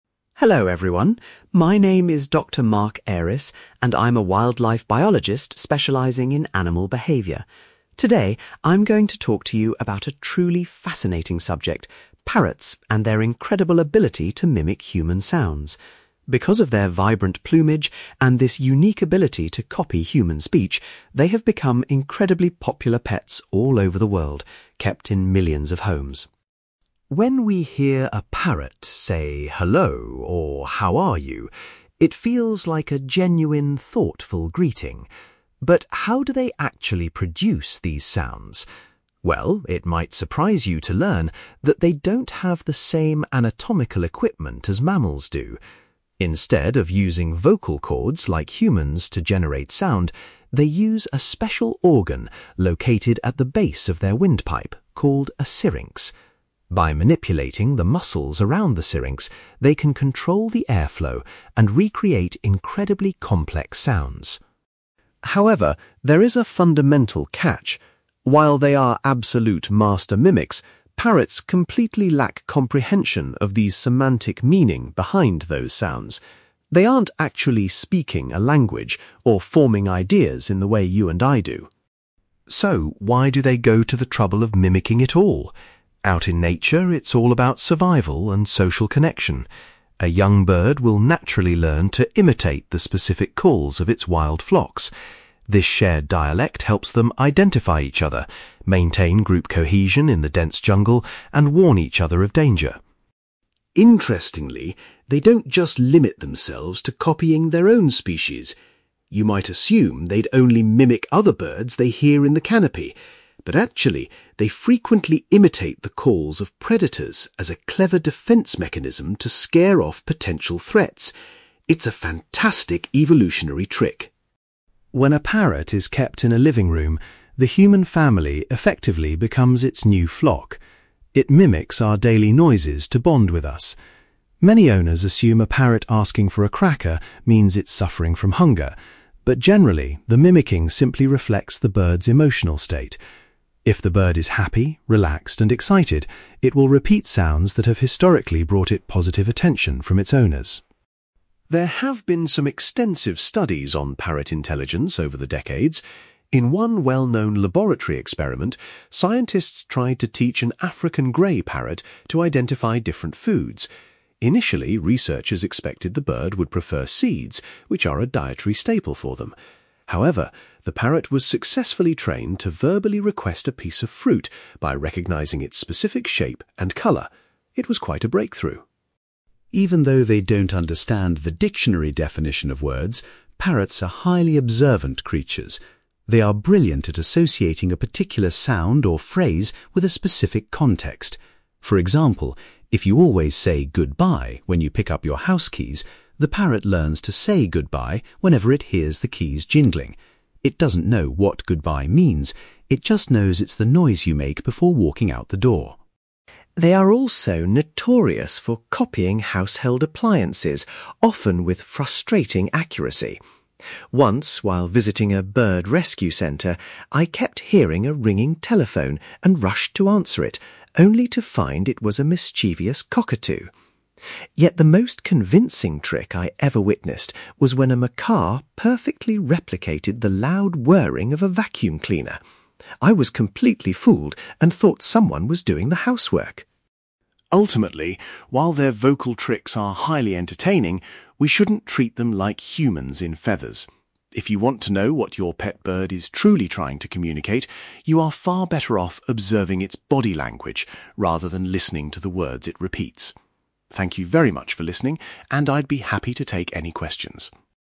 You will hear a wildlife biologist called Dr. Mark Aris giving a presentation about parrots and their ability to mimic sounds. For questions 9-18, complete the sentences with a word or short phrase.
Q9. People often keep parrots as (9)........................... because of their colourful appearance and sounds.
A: popular pets

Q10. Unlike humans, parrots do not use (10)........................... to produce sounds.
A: vocal chords

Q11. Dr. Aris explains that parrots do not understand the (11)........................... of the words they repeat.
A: semantic meaning

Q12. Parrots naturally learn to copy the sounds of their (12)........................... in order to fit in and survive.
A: wild flocks

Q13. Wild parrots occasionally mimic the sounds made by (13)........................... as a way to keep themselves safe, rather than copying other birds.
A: predators

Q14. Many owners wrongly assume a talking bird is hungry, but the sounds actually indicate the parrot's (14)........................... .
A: emotional state

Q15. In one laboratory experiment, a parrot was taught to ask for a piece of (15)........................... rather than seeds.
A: fruit

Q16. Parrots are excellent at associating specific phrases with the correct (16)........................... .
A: context

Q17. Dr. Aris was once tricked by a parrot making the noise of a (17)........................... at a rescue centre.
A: vacuum cleaner

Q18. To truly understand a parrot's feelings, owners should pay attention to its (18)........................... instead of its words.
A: body language

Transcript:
Dr. Mark Aris: Hello everyone. My name is Dr. Mark Aris, and I'm a wildlife biologist specialising in animal behaviour. Today, I'm going to talk to you about a truly fascinating subject: parrots and their incredible ability to mimic human sounds. Because of their vibrant plumage and this unique ability to copy human speech, they have become incredibly popular pets all over the world, kept in millions of homes.
When we hear a parrot say "Hello" or "How are you?", it feels like a genuine, thoughtful greeting. But how do they actually produce these sounds? Well, it might surprise you to learn that they don't have the same anatomical equipment as mammals do. Instead of using vocal chords like humans to generate sound, they use a special organ located at the base of their windpipe called a syrinx. By manipulating the muscles around the syrinx, they can control the airflow and recreate incredibly complex sounds.
However, there is a fundamental catch. While they are absolute master mimics, parrots completely lack comprehension of the semantic meaning behind those sounds. They aren't actually speaking a language or forming ideas in the way you and I do.
So, why do they go to the trouble of mimicking at all? Out in nature, it's all about survival and social connection. A young bird will naturally learn to imitate the specific calls of its wild flocks. This shared dialect helps them identify each other, maintain group cohesion in the dense jungle, and warn each other of danger.
Interestingly, they don't just limit themselves to copying their own species. You might assume they'd only mimic other birds they hear in the canopy, but actually, they frequently imitate the calls of predators as a clever defence mechanism to scare off potential threats. It's a fantastic evolutionary trick.
When a parrot is kept in a living room, the human family effectively becomes its new flock. It mimics our daily noises to bond with us. Many owners assume a parrot asking for a cracker means it's suffering from hunger, but generally, the mimicking simply reflects the bird's emotional state. If the bird is happy, relaxed, and excited, it will repeat sounds that have historically brought it positive attention from its owners.
There have been some extensive studies on parrot intelligence over the decades. In one well-known laboratory experiment, scientists tried to teach an African Grey parrot to identify different foods. Initially, researchers expected the bird would prefer seeds, which are a dietary staple for them. However, the parrot was successfully trained to verbally request a piece of fruit by recognizing its specific shape and colour. It was quite a breakthrough.
Even though they don't understand the dictionary definition of words, parrots are highly observant creatures. They are brilliant at associating a particular sound or phrase with a specific context. For example, if you always say "goodbye" when you pick up your house keys, the parrot learns to say "goodbye" whenever it hears the keys jingling. It doesn't know what "goodbye" means, it just knows it's the noise you make before walking out the door.
They are also notorious for copying household appliances, often with frustrating accuracy. Once, while visiting a bird rescue centre, I kept hearing a ringing telephone and rushed to answer it, only to find it was a mischievous cockatoo. Yet the most convincing trick I ever witnessed was when a macaw perfectly replicated the loud whirring of a vacuum cleaner. I was completely fooled and thought someone was doing the housework!
Ultimately, while their vocal tricks are highly entertaining, we shouldn't treat them like humans in feathers. If you want to know what your pet bird is truly trying to communicate, you are far better off observing its body language rather than listening to the words it repeats. Thank you very much for listening, and I'd be happy to take any questions.

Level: B2